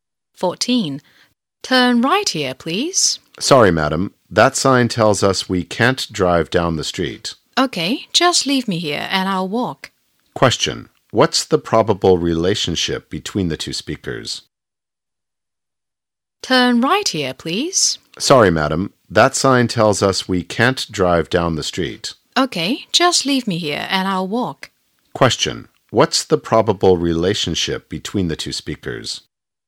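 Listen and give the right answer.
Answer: Taxi driver and passenger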